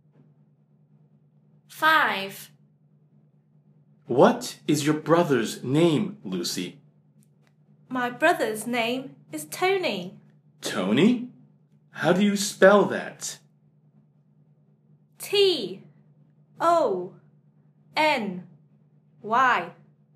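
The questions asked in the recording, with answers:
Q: What is your brother's name, Lucy?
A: Tony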